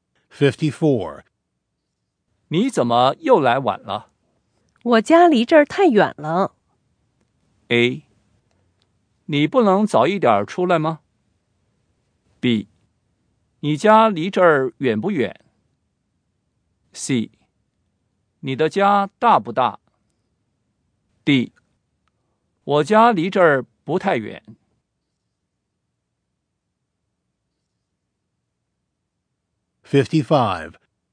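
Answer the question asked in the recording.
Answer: A: 你不能早一点出来吗?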